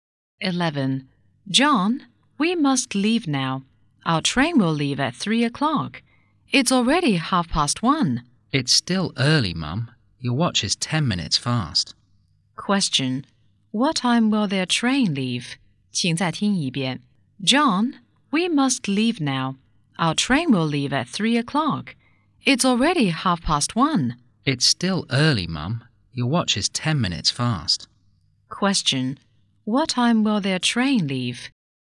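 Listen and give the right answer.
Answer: At 3 o'clock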